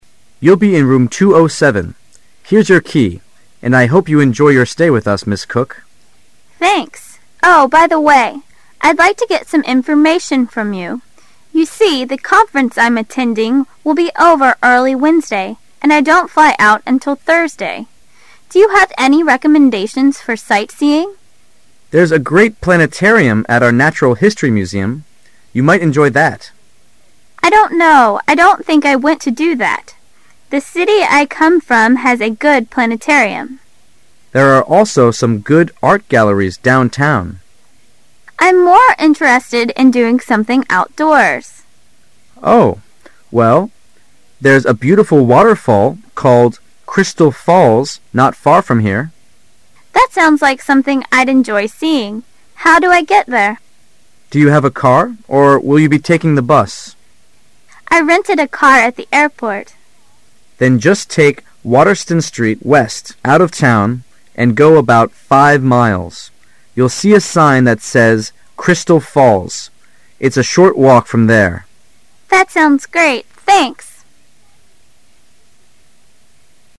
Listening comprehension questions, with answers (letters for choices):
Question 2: What does Ms. Cook imply that her main purpose was in coming to this town?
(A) To attend a conference.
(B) To see the planetarium.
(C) To change planes.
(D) To go sightseeing.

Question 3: Why does Ms. Cook not want to go the planetarium?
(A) She recently went mere.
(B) It's not a very good one.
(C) There' s one in her home town.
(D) It will be closed when she's free.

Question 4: How will Ms. Cook probably get to the waterfall?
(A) On foot and by boat.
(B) By car and on foot.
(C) By air and by car.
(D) By air and by bus.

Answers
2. A
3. C
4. B

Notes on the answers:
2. [解析] 注意对文章内容的分析,抓住关键点。 [详细解答]虽然对话主要谈的是旅游观光的事宜,但这并不是Ms Cook此行的主要目的,因为对话中Ms.Cook说"the conference I am attending..."。所以A是正确答案。
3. [解析] 对文章细节的选取。 [详细解答]细节题。A、B、D都没有足够的证据;C项是正确答案,因为Ms.Cook说:"The city I come from has a good planetarium"。
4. [解题思路]从容易混淆的选项中辨认出正确答案。 [详细解答]几个选项乍一看比较混乱,但细听后应选B,因为Ms.Cook说:"I rented a car at the airport.";当被建议看到瀑布的标记时,可以步行一段路,Ms.Cook说:"That's sounds great."

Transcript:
[解析] F1 : You'll be in Room 207. Here's your key, and I hope you enjoy your stay with us, Ms. Cook. F2 : Thanks. Oh, by the way, I'd like to get some information from you. You see, the conference I'm attending will be over early Wednesday, and I don't fly out until Thursday. Do you have any recommendations for sightseeing? F1 : There's a great planetarium at our natural history museum. You might enjoy that. F2: I don't know I don't think I went to do that. The city I come from has a good planetarium. F1 : There are also some good art galleries downtown. F2: I'm more interested in doing something outdoors. F1: Oh, well, there's a beautiful waterfall called Crystal Fails not far from here. F2 : That sounds like something I'd enjoy seeing. How do I get there? F1 : Do you have a car, or will you be taking a bus? F2:1 rented a car at the airport. F1 : Then just take Water son Street west out of town and go "about five miles. You'll see a sign that says Crystal Falls. It's a short walk from there. F2 : That sounds great. Thanks!